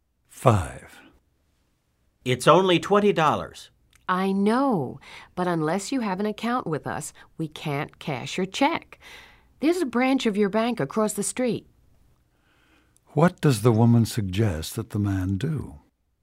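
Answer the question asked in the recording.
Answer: Go to his own bank's branch across the street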